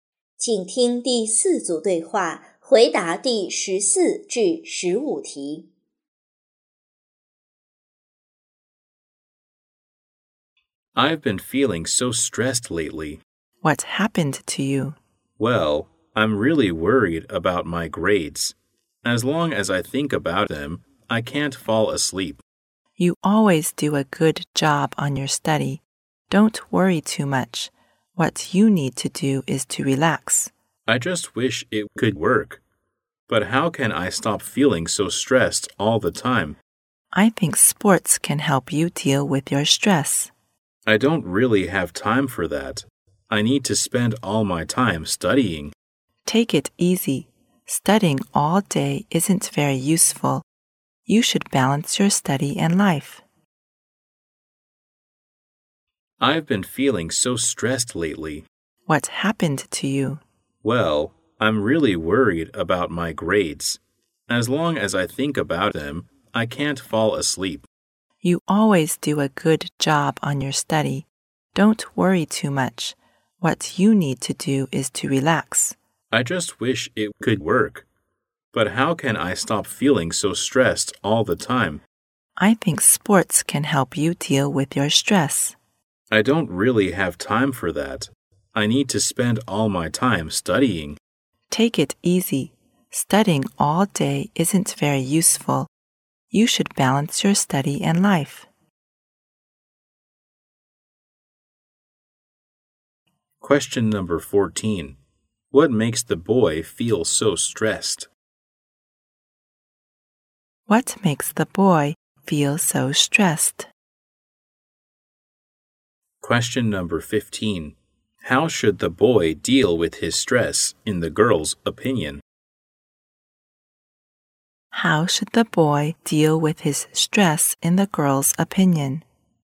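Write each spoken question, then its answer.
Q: What makes the boy feel so stressed?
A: His grades

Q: How should the boy deal with his stress, in the girl's opinion?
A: By doing sports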